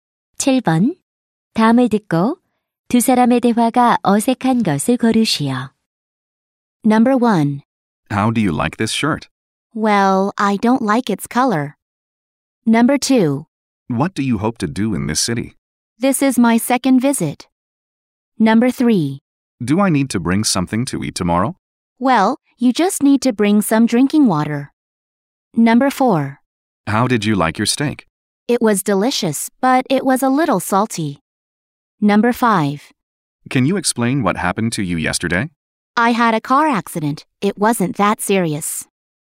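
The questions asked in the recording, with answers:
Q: 다음을 듣고 두 사람의 대화가 어색한 것을 고르시오.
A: 2: What do you hope to do in this city? / This is my second visit.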